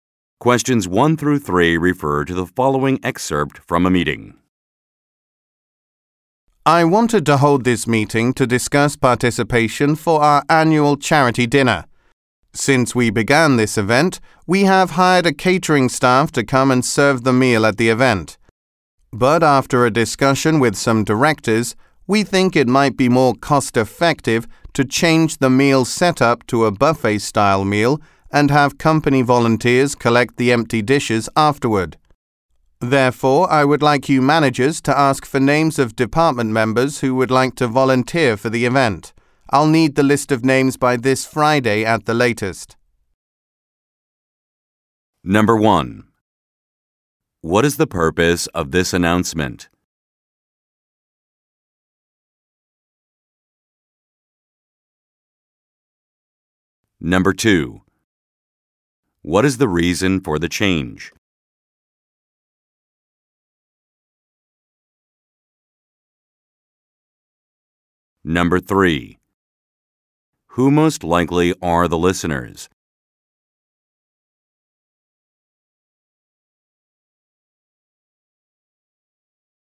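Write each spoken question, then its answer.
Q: What is the purpose of this announcement?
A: To ask for volunteers for the annual charity dinner

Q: What is the reason for the change?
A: It is more cost-effective

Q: Who most likely are the listeners?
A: Managers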